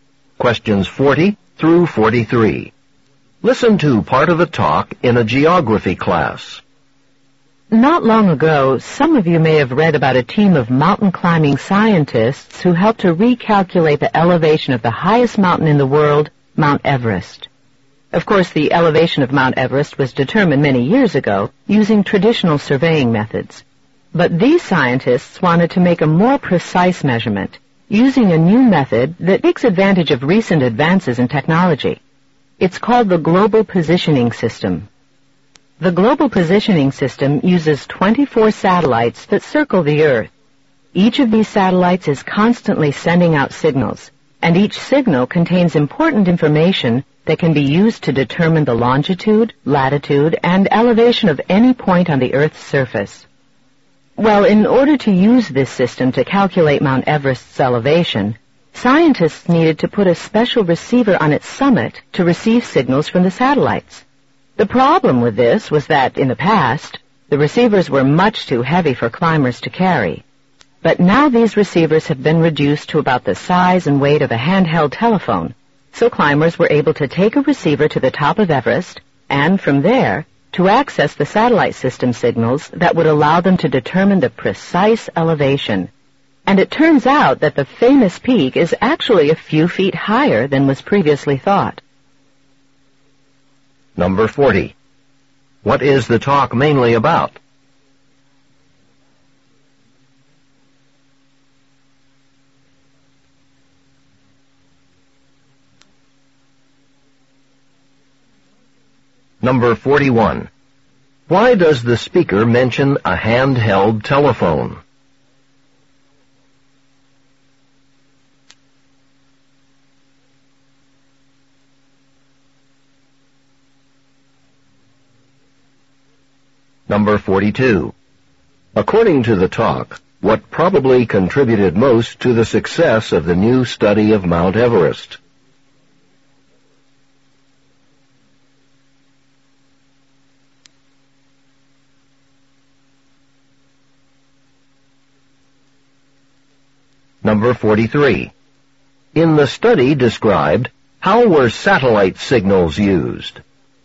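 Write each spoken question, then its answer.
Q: What is the talk mainly about?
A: Using the Global Positioning System to remeasure the elevation of Mount Everest

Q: Why does the speaker mention a handheld telephone?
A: To show how small and light the receivers have become

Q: According to the talk, what probably contributed most to the success of the new study of Mount Everest?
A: Lighter, smaller receivers that climbers could carry to the summit

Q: In the study described, how were satellite signals used?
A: To determine the precise elevation of Mount Everest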